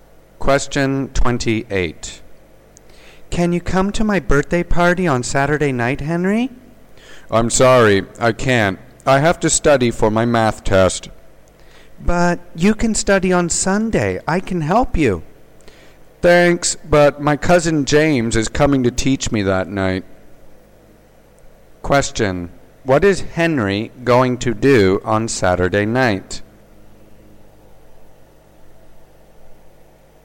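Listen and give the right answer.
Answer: Study math with his cousin James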